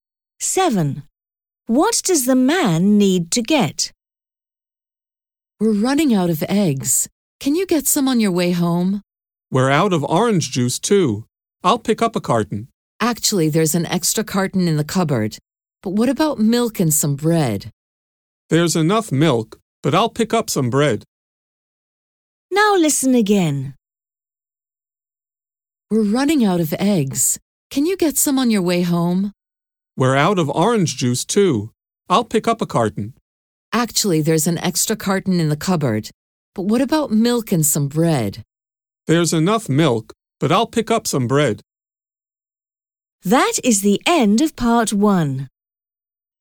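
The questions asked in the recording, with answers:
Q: What does the man need to get?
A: Eggs and bread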